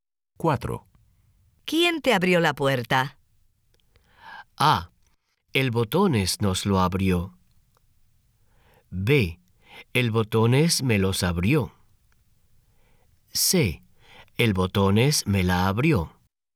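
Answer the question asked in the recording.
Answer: C: El Botones me la abrió.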